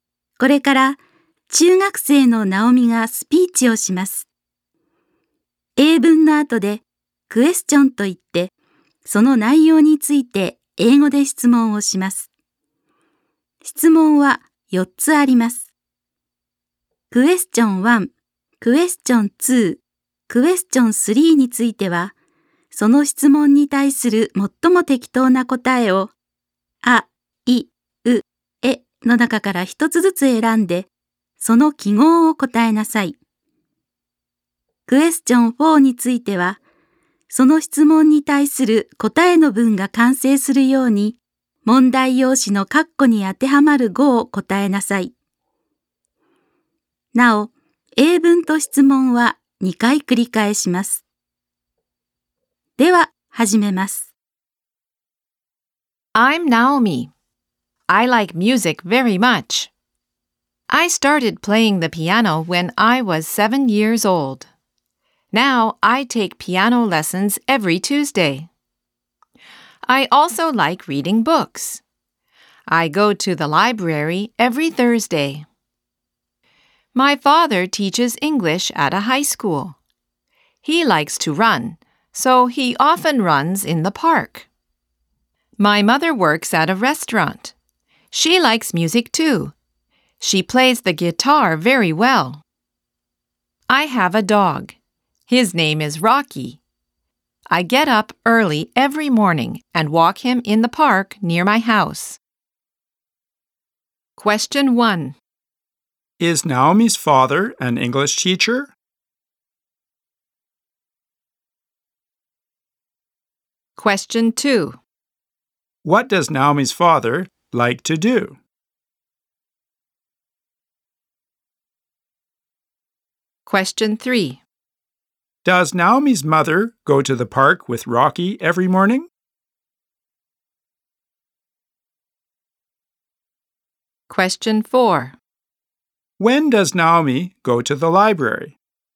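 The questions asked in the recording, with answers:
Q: Is Naomi's father an English teacher?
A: Yes, he is.

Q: What does Naomi's father like to do?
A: He likes to run.

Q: Does Naomi's mother go to the park with Rocky every morning?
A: No, she doesn't.

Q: When does Naomi go to the library?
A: Every Thursday.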